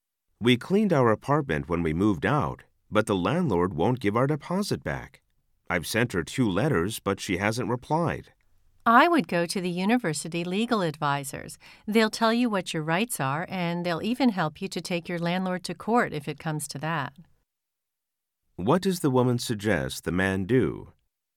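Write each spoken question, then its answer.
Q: What does the woman suggest the man do?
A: Go to the university legal advisors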